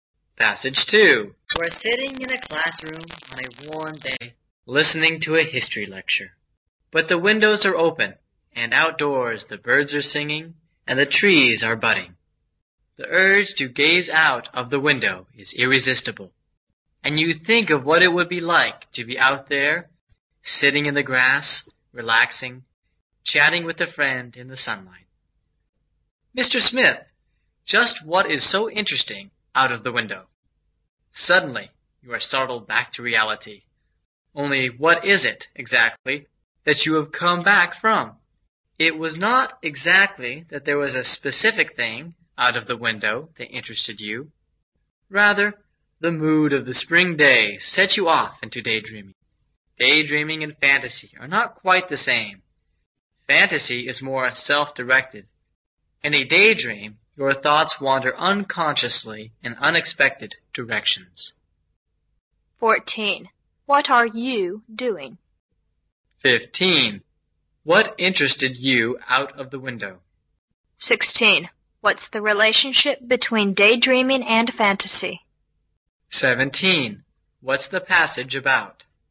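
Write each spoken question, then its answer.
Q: What are you doing?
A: Listening to a history lecture

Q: What interested you out of the window?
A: Nothing specific; the mood of the spring day

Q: What's the relationship between daydreaming and fantasy?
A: They are not quite the same

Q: What's the passage about?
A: Daydreaming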